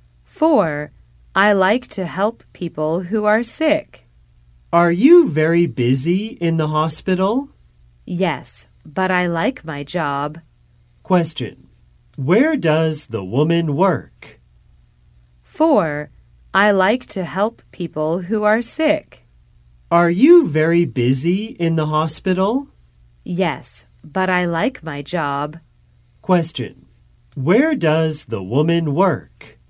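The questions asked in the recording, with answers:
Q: Where does the woman work?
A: In a hospital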